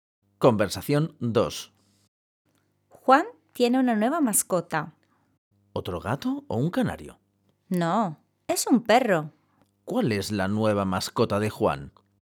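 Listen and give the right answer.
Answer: Un perro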